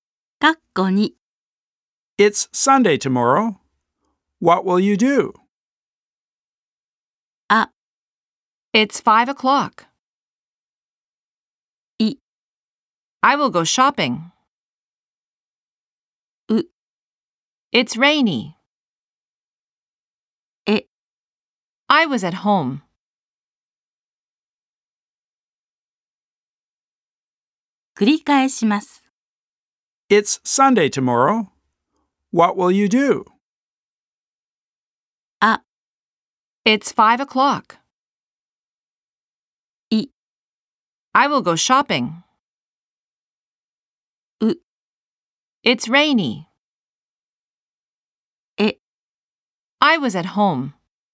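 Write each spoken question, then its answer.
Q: It's Sunday tomorrow. What will you do?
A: I: I will go shopping.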